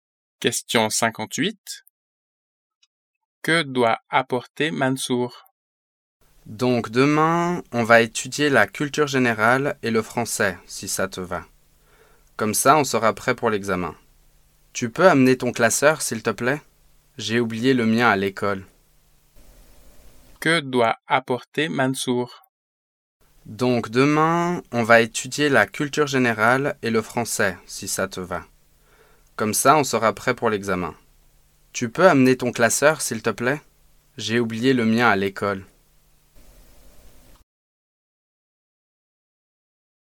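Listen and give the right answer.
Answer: Son classeur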